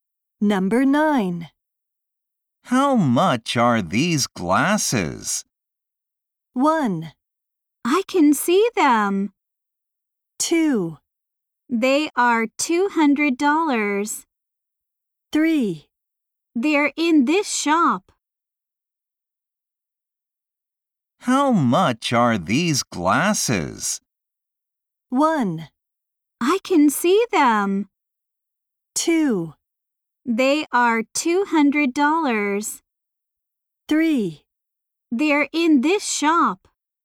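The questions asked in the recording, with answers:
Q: How much are these glasses?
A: 2: They are $200.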